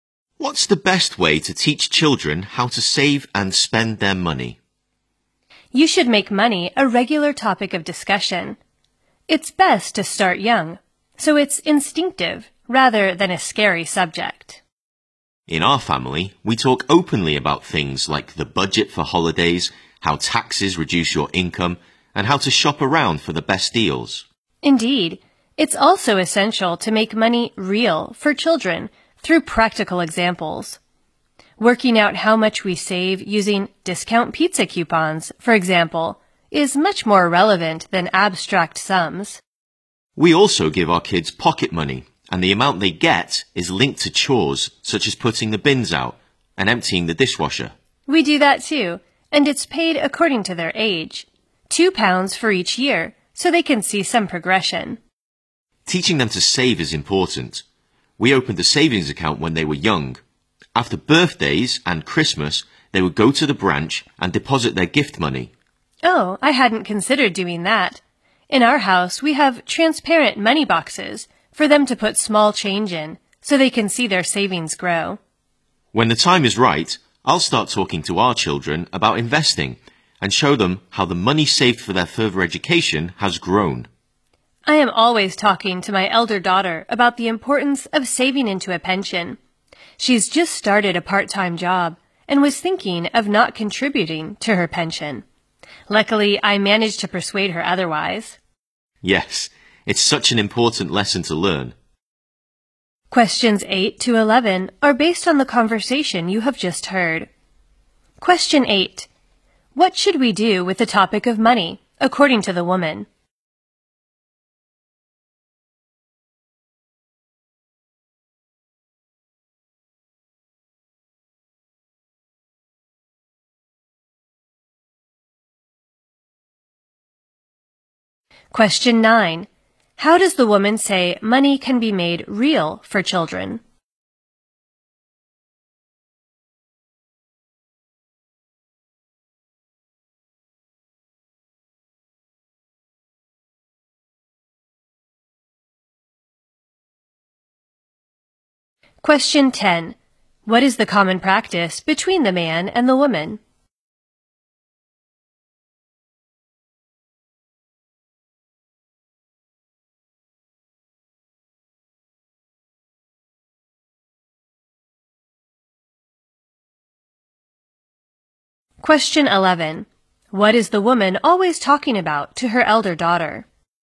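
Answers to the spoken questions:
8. Make it a regular topic of discussion
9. Through practical examples
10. Giving their kids pocket money
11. The importance of saving into a pension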